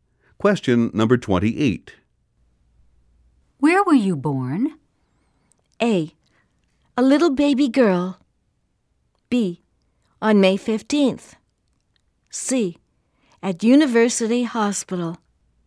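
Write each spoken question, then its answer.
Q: Where were you born?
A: C: At University Hospital.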